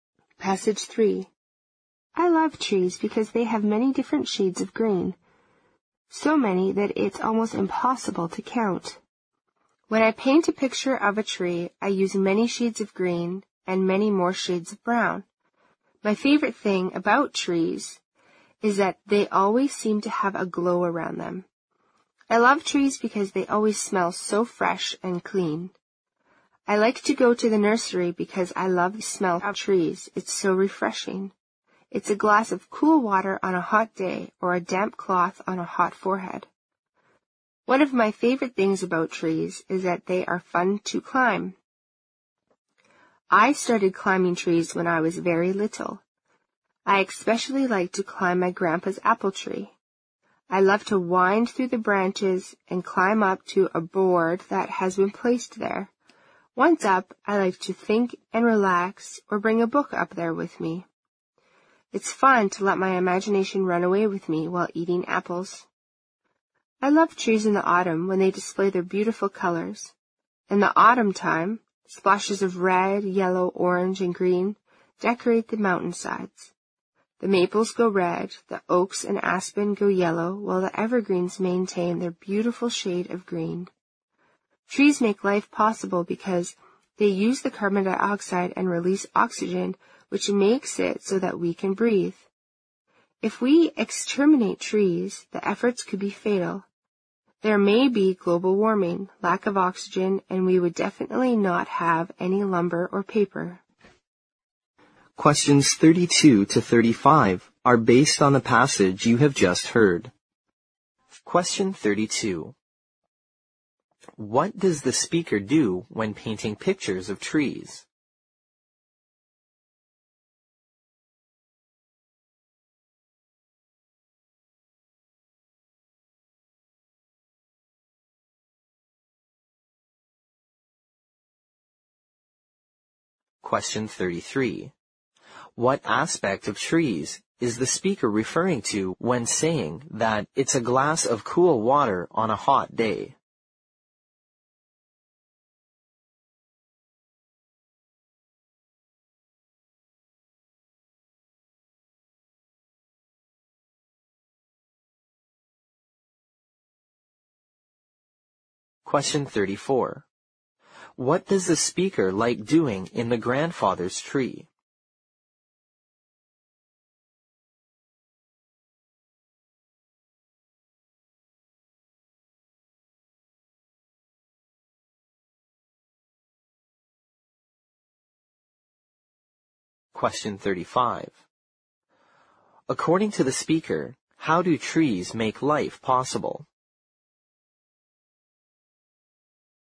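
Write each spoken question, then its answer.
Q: What does the speaker do when painting pictures of trees?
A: Uses many shades of green and brown

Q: What aspect of trees is the speaker referring to when saying that it's a glass of cool water on a hot day?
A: Their fresh, clean smell

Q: What does the speaker like doing in the grandfather's tree?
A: Thinking and relaxing or reading a book

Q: According to the speaker, how do trees make life possible?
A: They use carbon dioxide and release oxygen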